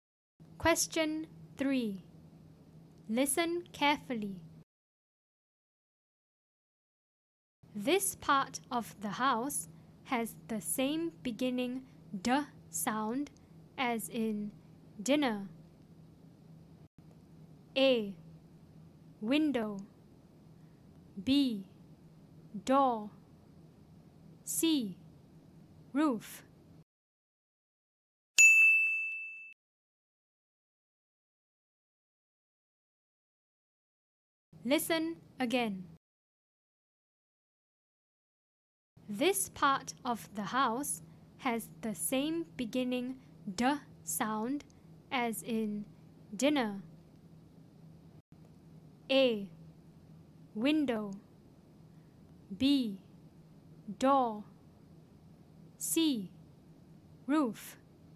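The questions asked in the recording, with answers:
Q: This part of the house has the same beginning d sound as in dinner.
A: B: Door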